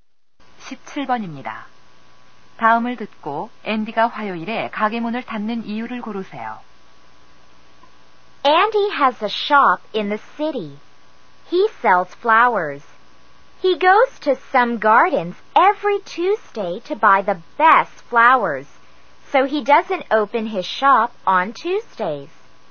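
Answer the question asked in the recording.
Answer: 좋은 꽃을 사러 정원에 가서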